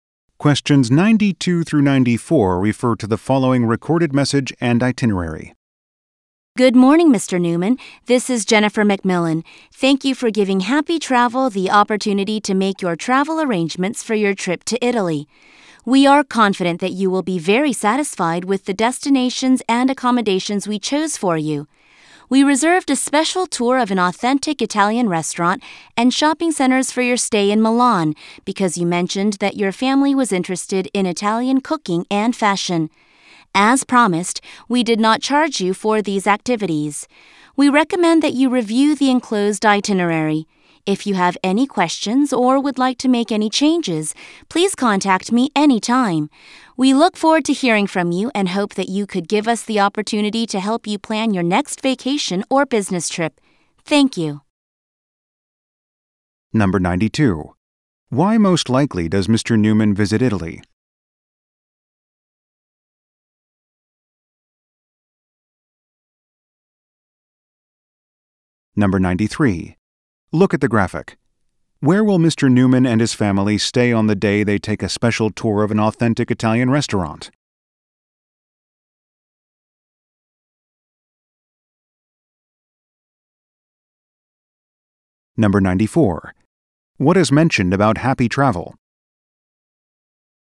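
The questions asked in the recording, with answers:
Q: What is mentioned about happy travel?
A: It did not charge for the special tour activities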